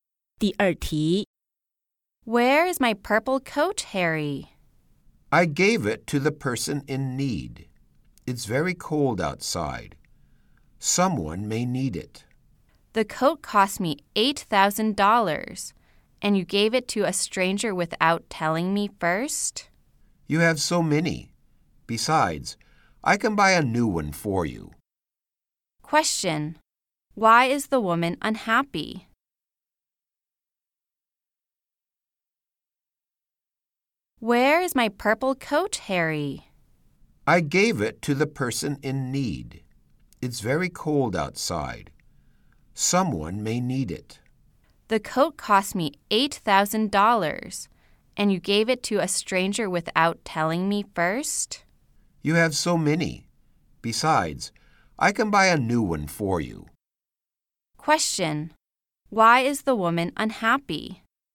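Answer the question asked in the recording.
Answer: Harry gave her $8,000 coat to a stranger without telling her first.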